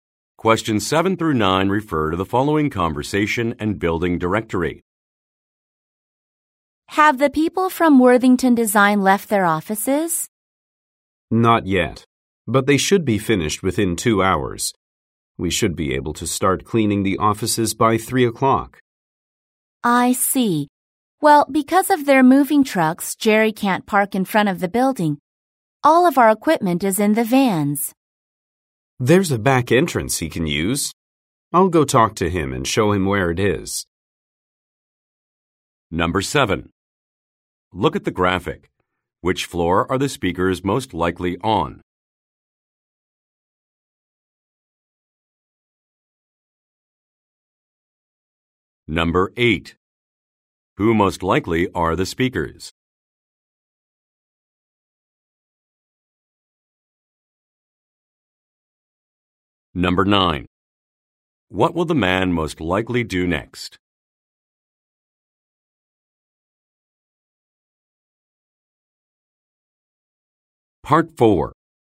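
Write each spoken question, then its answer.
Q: What will the man most likely do next?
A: Talk to Jerry and show him the back entrance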